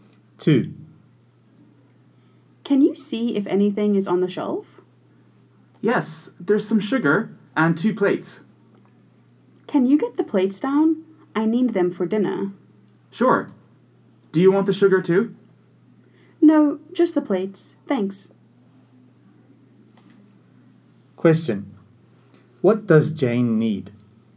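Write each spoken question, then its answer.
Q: What does Jane need?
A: The plates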